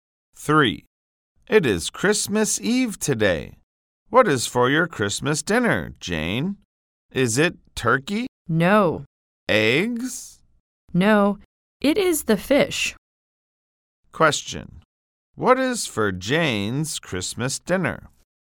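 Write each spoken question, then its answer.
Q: What is for Jane's Christmas dinner?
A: Fish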